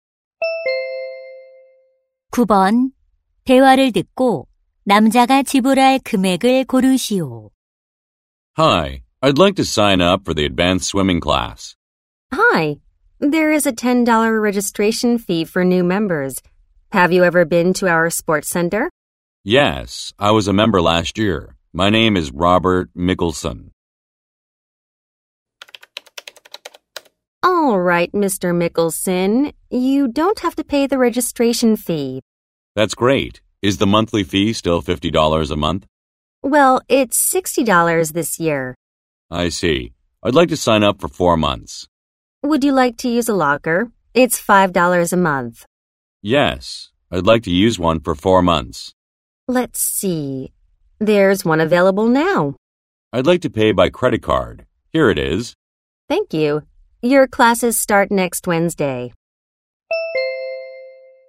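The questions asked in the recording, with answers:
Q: 대화를 듣고 남자가 지불할 금액을 고르시오.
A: $260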